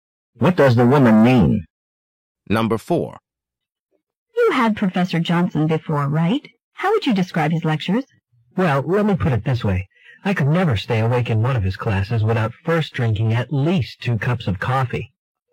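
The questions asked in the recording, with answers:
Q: What does the man imply?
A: Professor Johnson's lectures are boring.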